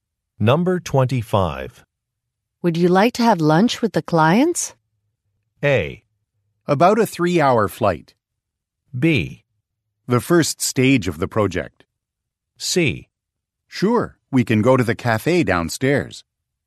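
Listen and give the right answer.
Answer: C: Sure, we can go to the cafe downstairs.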